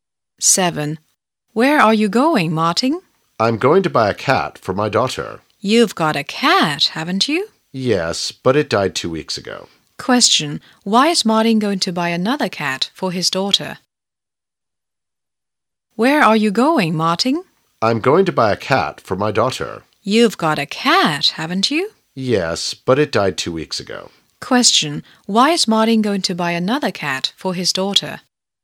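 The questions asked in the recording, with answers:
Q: Why is Martin going to buy another cat for his daughter?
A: Because their cat died two weeks ago.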